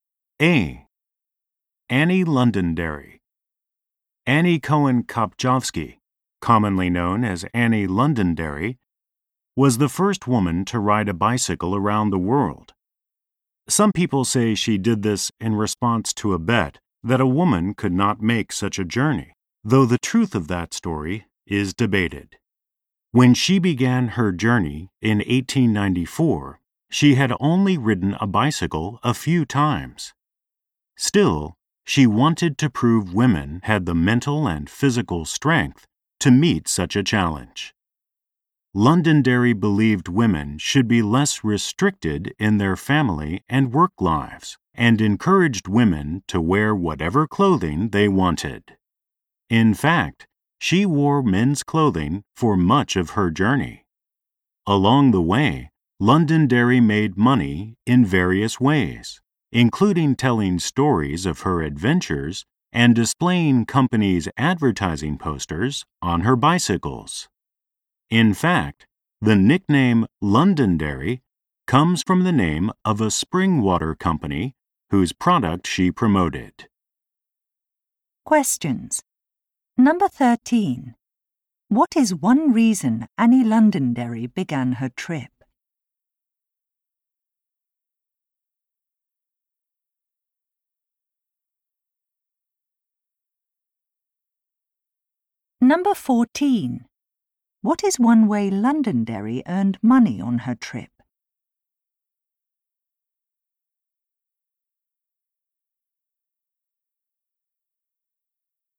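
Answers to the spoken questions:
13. To prove women had the mental and physical strength for such a challenge
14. By displaying companies' advertising posters on her bicycles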